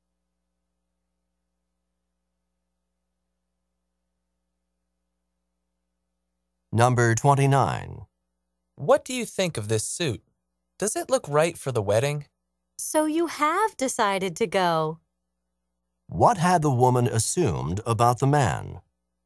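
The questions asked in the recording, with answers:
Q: What had the woman assumed about the man?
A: That he wasn't going to the wedding.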